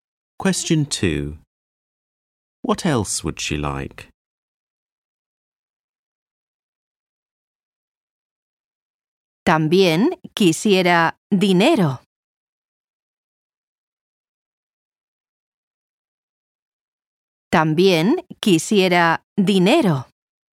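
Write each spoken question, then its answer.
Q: What else would she like?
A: Money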